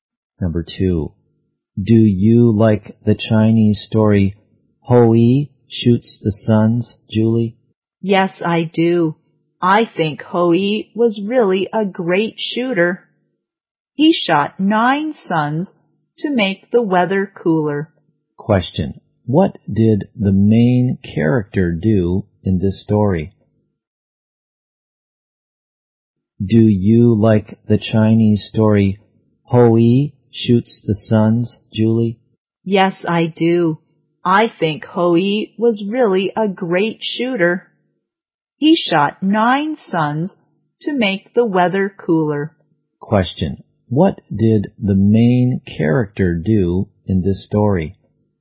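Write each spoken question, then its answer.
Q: what did the main character do in this story?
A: He shot 9 suns to make the weather cooler.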